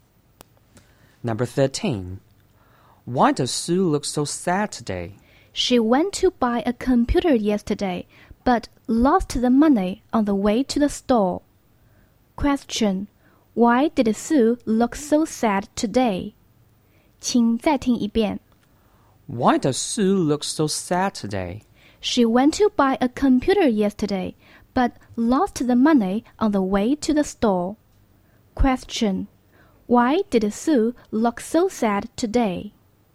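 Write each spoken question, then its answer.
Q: Question. Why did Sue look so sad today?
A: She lost the money for a computer on the way to the store.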